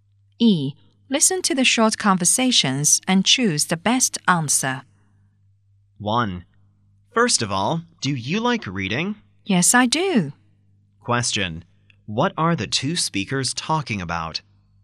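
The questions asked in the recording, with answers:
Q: What are the two speakers talking about?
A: Reading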